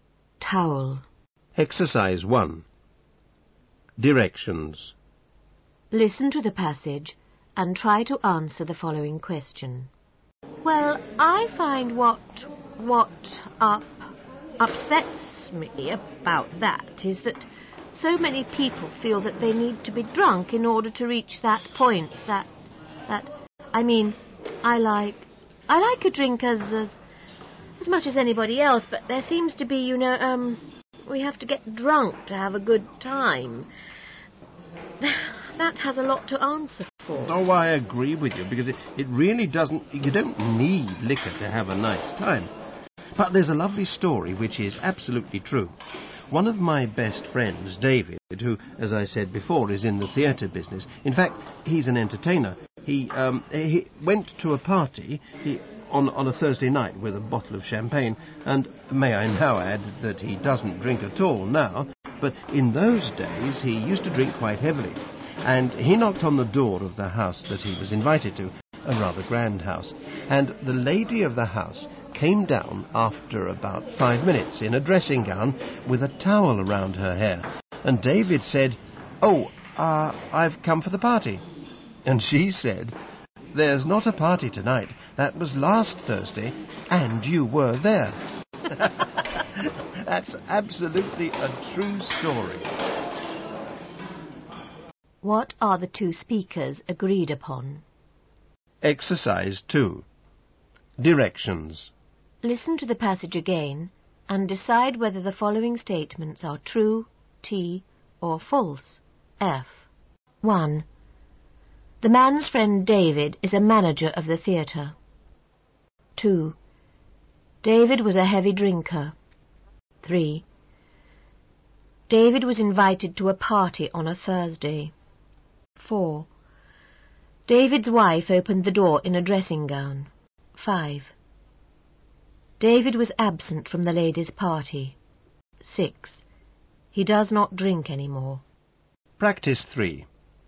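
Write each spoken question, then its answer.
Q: What are the 2 speakers agreed upon?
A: You don't need liquor to have a nice time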